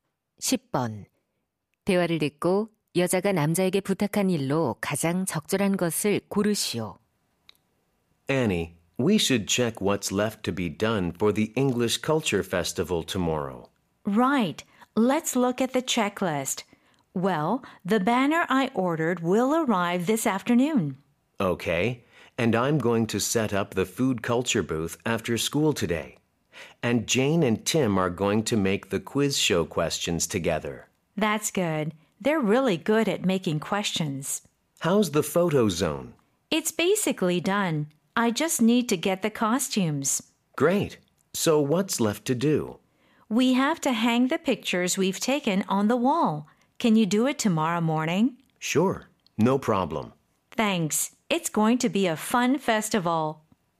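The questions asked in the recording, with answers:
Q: 대화를 듣고 여자가 남자에게 부탁한 일로 가장 적절한 것을 고르시오.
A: 찍은 사진을 벽에 걸기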